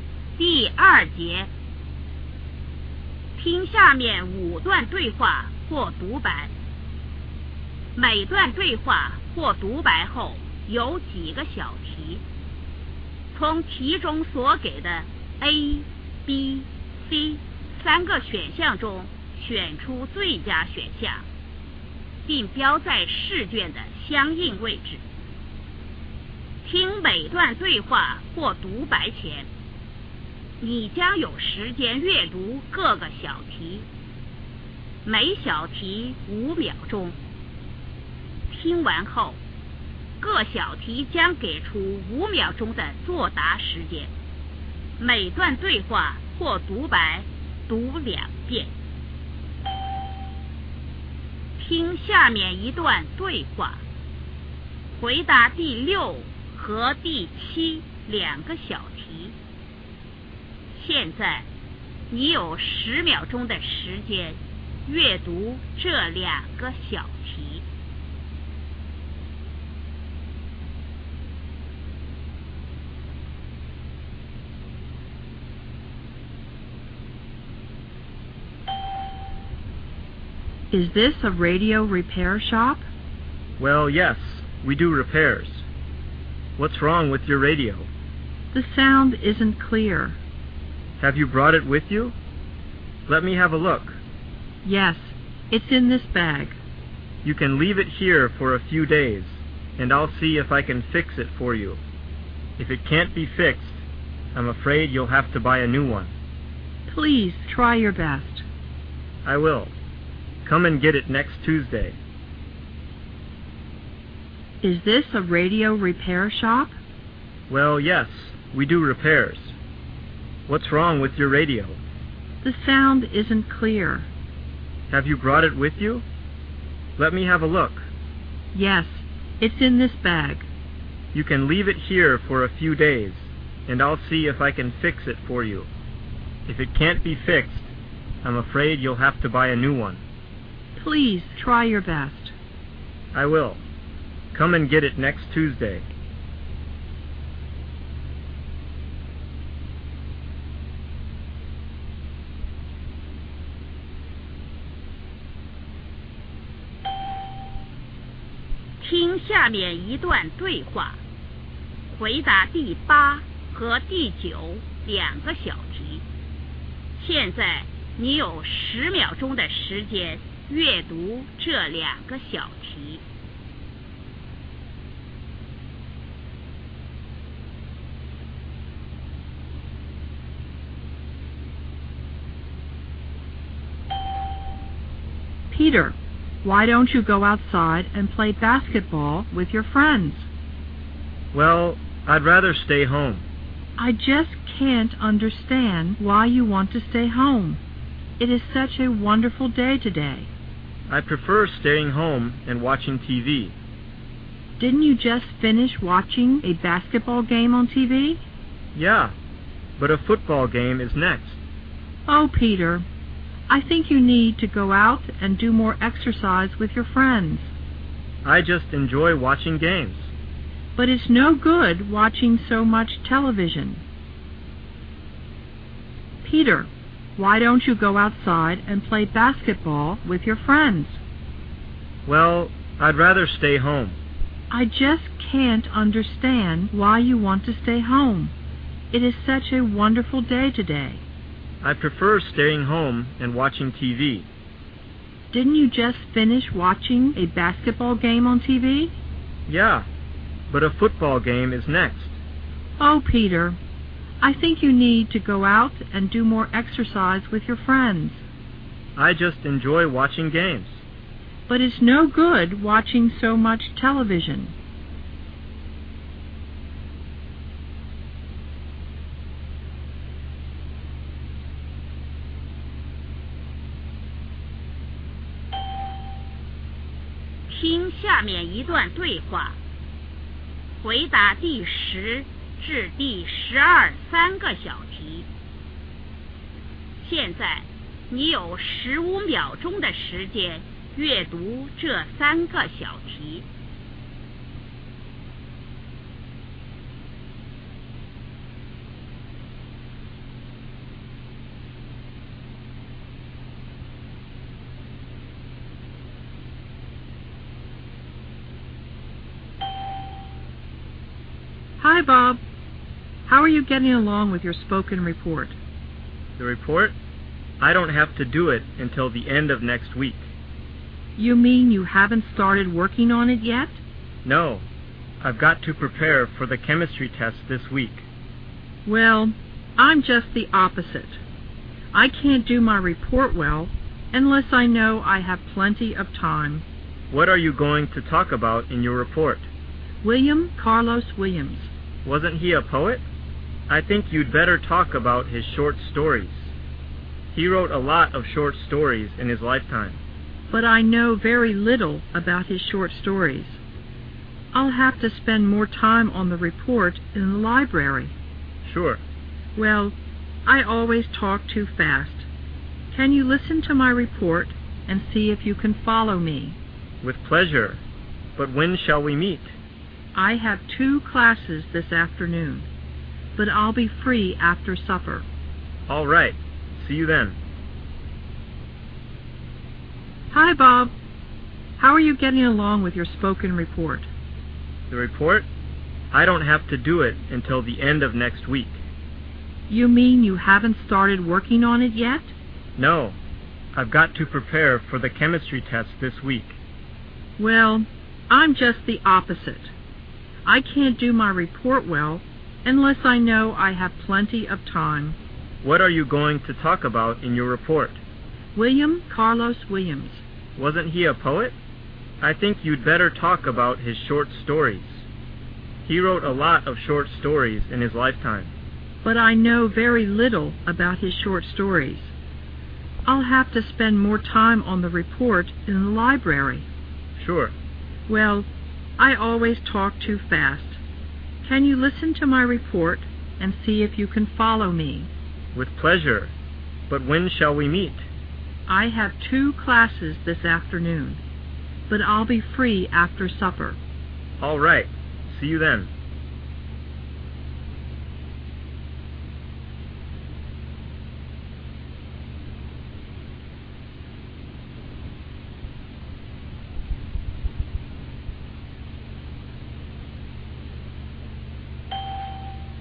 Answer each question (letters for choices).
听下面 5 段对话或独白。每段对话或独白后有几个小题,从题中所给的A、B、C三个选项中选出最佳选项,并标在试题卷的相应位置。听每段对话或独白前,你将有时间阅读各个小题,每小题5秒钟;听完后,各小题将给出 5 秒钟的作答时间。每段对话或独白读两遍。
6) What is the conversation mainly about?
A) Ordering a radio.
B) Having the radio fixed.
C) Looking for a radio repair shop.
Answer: B

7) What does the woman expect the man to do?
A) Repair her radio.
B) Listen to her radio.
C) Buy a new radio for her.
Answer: A

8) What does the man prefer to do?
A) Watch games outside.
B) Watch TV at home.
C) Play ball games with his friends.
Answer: B

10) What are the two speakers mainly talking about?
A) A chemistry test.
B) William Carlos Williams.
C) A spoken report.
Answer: C

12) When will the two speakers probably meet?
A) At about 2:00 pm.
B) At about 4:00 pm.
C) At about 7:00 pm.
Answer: C